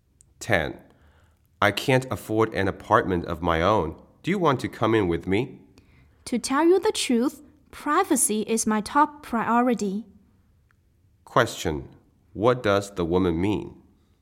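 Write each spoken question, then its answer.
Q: What does the woman mean?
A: She doesn't want to share the apartment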